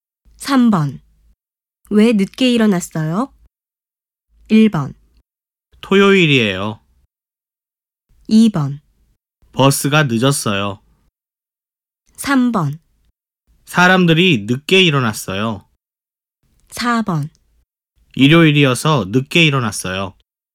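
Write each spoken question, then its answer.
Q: 왜 늦게 일어났어요?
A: 4: 일요일이어서 늦게 일어났어요.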